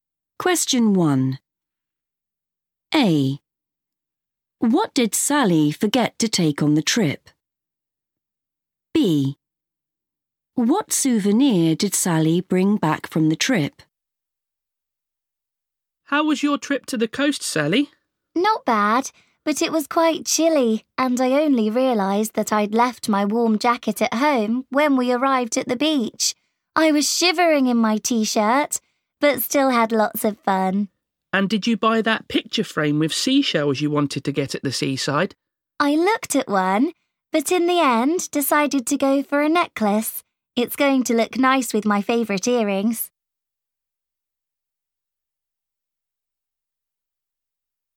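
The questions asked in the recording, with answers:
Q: What did Sally forget to take on the trip?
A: her warm jacket

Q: What souvenir did Sally bring back from the trip?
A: a necklace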